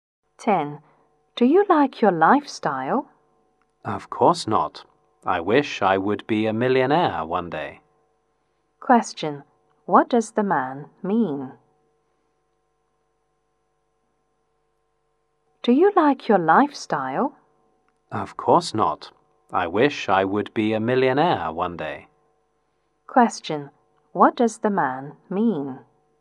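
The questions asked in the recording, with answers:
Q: What does the man mean?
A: He doesn't like his lifestyle and wishes to be a millionaire one day.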